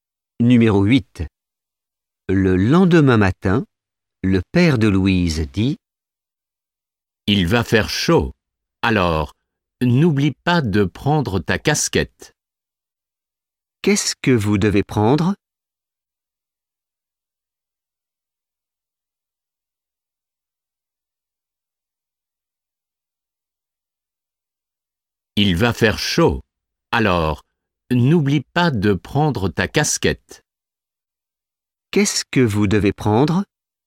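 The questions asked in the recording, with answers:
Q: Qu'est-ce que vous devez prendre?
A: Une casquette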